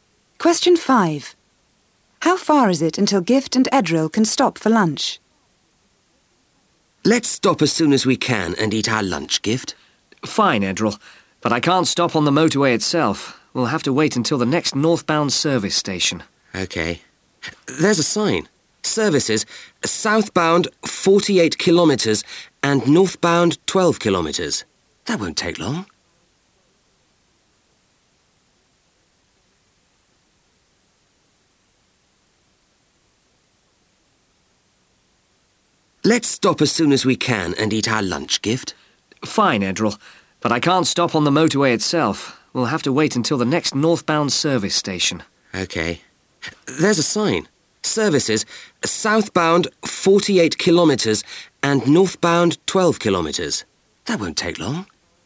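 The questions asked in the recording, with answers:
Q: How far is it until Gift and Edril can stop for lunch?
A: 12 kilometres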